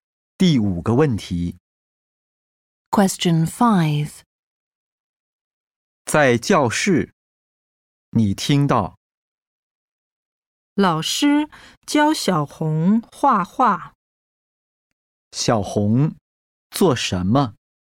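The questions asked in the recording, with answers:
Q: 小红做什么?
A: 画画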